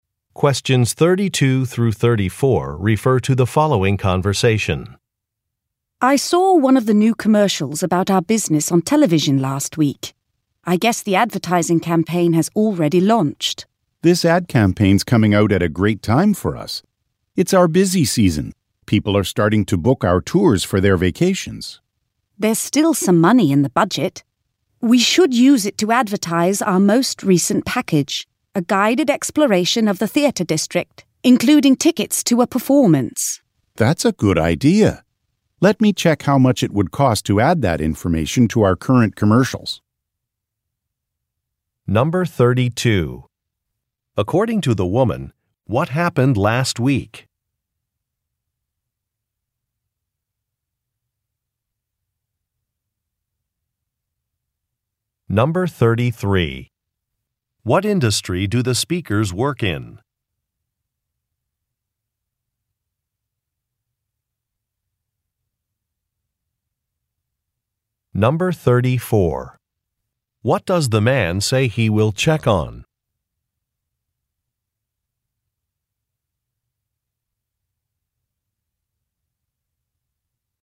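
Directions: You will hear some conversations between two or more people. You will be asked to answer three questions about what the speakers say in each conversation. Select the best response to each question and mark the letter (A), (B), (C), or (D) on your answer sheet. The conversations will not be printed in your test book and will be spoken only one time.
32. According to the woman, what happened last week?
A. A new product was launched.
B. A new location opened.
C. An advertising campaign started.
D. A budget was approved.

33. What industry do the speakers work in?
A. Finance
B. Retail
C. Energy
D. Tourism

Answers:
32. C
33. D

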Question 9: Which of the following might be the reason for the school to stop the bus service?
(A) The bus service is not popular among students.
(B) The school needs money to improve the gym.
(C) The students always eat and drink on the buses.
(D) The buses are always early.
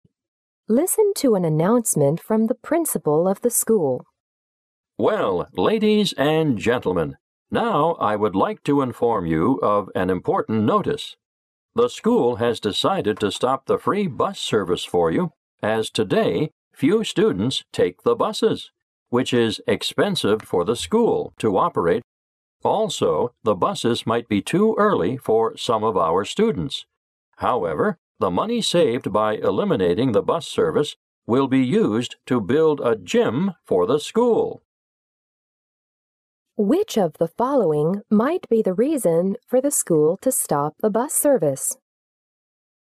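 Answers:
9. A

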